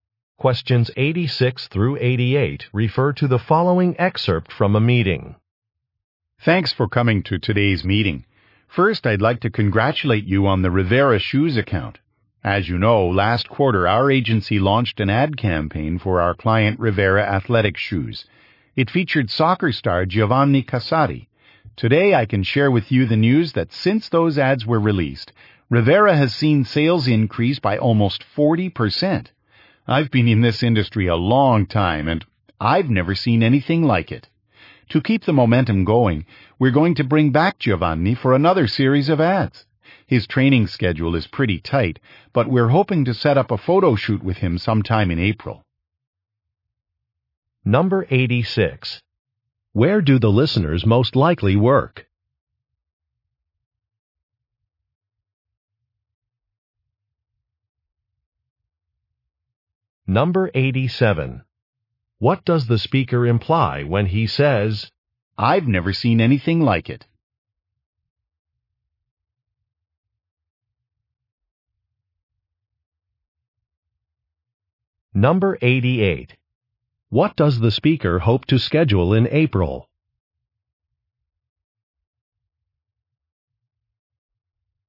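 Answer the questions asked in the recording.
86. At an advertising agency
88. A photo shoot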